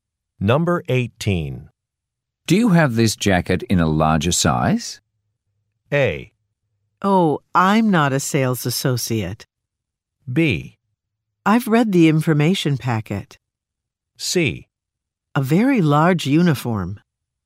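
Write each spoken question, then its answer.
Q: Do you have this jacket in a larger size?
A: A: Oh, I'm not a sales associate.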